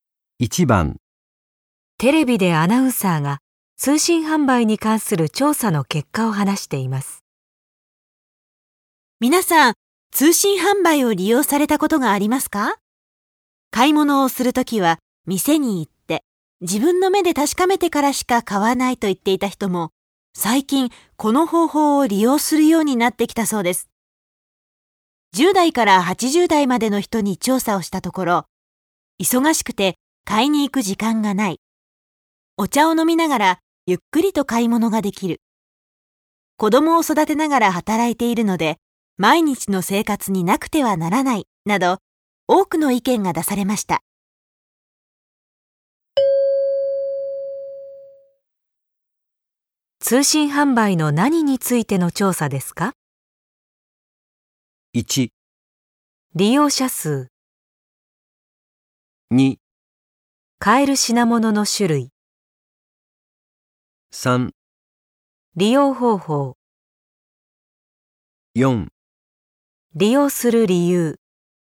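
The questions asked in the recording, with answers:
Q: 通信販売の何についての調査ですか?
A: 4: 利用する理由。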